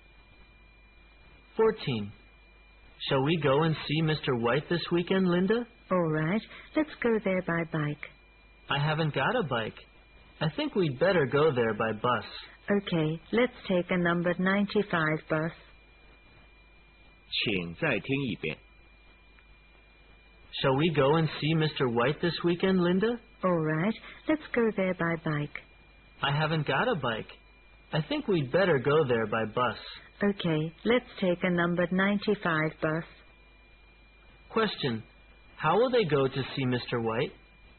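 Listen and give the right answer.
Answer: By bus (number 95)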